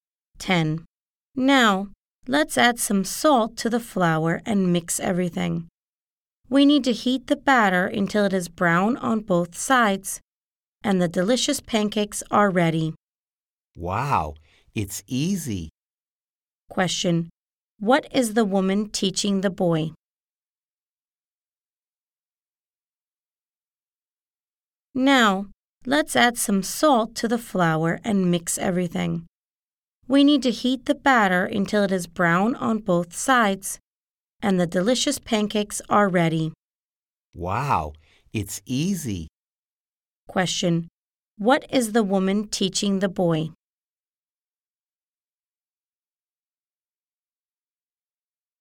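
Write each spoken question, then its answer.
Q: Question. What is the woman teaching the boy?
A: How to make pancakes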